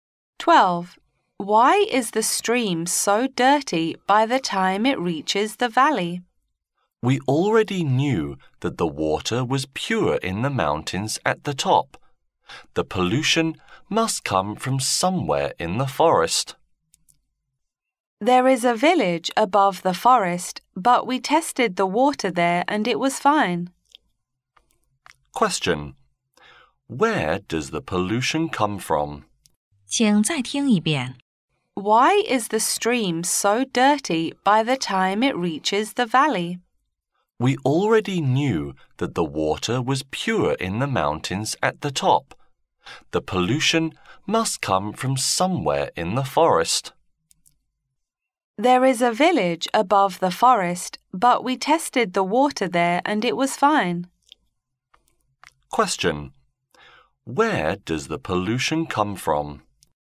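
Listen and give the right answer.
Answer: Somewhere in the forest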